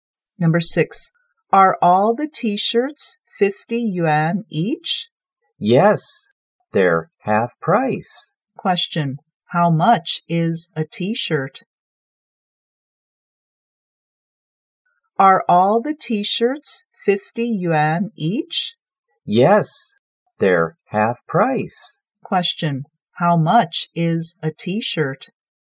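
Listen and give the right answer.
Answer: 50 yuan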